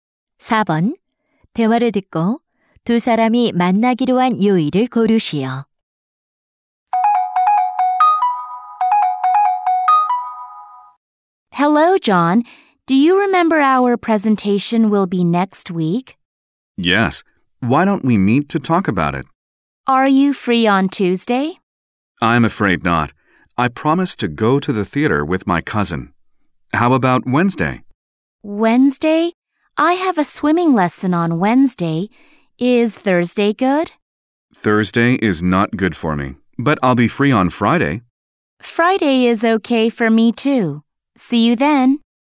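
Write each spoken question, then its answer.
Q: 대화를 듣고 두 사람이 만나기로 한 요일을 고르시오.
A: 금요일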